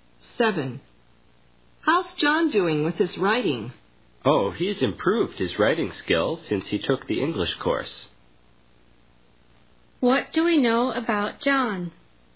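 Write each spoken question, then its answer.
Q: What do we know about John?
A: His writing has improved since he took the English course.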